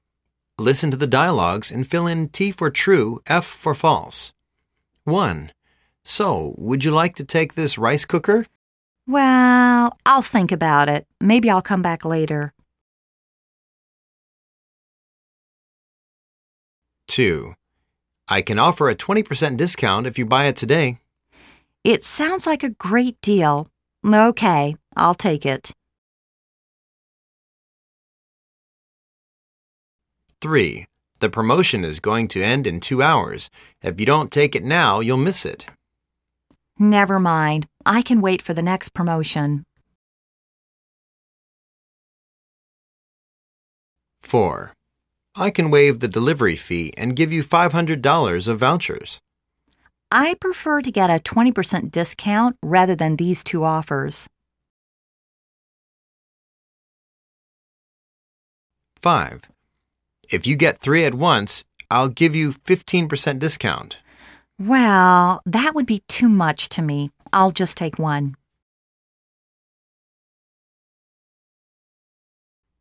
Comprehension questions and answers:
Listen to the dialogues and fill in T for"True",F for "False".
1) He has decided to buy the rice cooker.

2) He is happy with the discount.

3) He doesn't want to miss this promotion.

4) He is not satisfied with the offers.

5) He didn't take three of them.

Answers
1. False
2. True
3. False
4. True
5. True